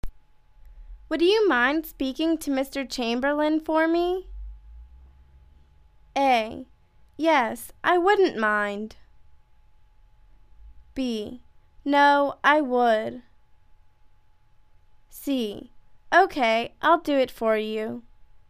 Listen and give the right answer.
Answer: OK, I'll do it for you.